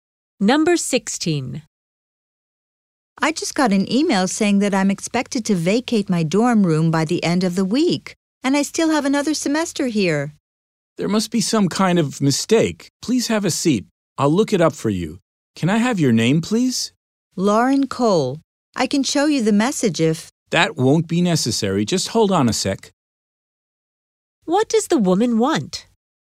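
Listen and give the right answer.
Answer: To fix the mistake about having to leave her dorm room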